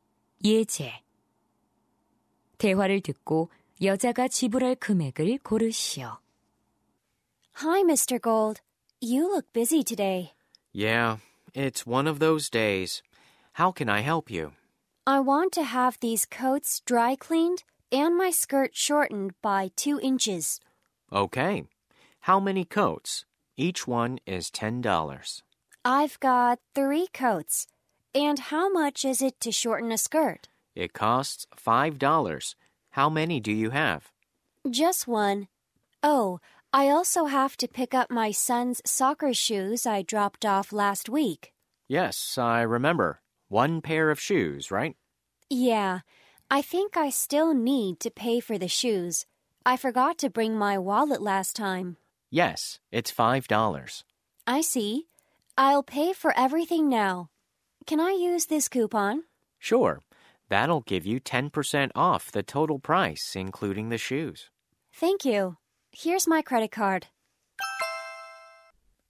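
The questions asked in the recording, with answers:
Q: 대화를 듣고 여자가 지불할 금액을 고르시오.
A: $36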